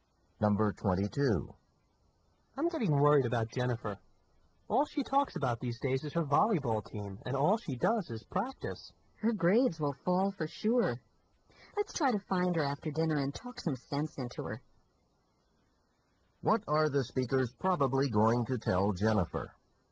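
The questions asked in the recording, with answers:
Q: What are the speakers probably going to tell Jennifer?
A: To spend less time on volleyball and more on studying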